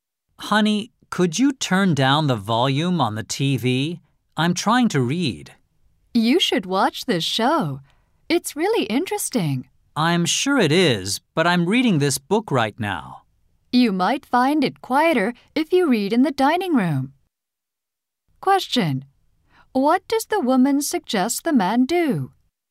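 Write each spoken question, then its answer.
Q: What does the woman suggest the man do?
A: Read in the dining room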